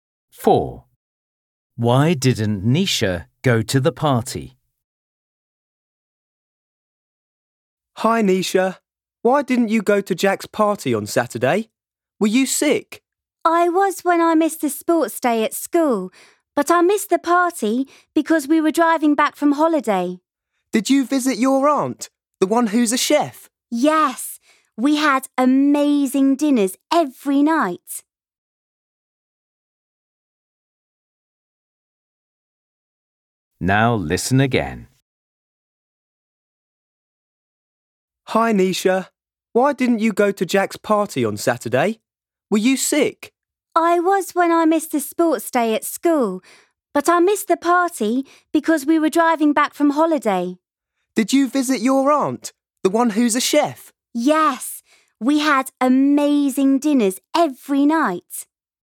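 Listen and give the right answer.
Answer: She was driving back from holiday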